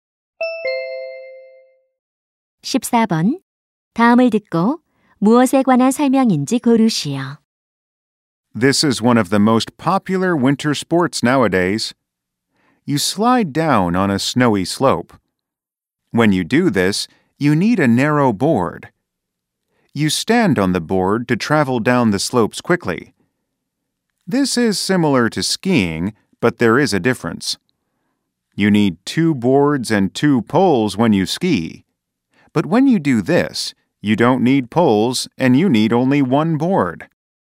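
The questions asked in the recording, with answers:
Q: 다음을 듣고 무엇에 관한 설명인지 고르시오.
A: 스노보드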